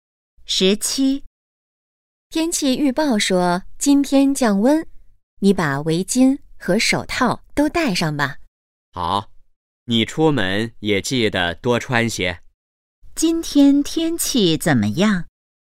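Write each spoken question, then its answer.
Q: 今天天气怎么样?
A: 降温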